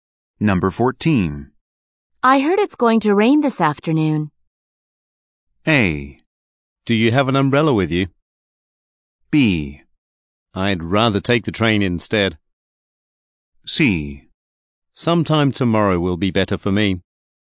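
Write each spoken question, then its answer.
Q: I heard it's going to rain this afternoon.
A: A: Do you have an umbrella with you?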